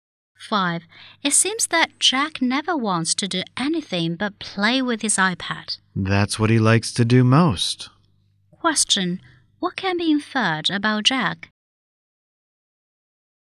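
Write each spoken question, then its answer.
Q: What can be inferred about Jack?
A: He likes playing with his iPad most.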